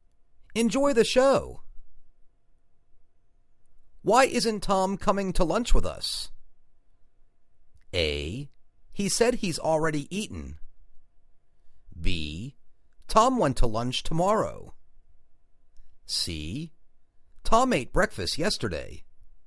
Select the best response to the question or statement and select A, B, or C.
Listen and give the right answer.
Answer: He said he's already eaten.